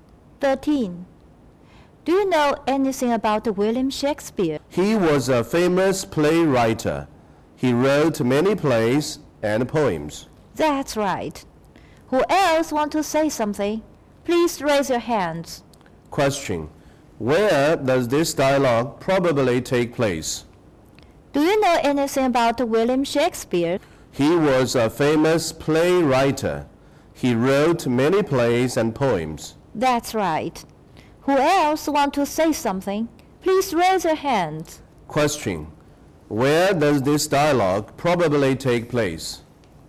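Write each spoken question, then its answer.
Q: Where does this dialogue probably take place?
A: In a classroom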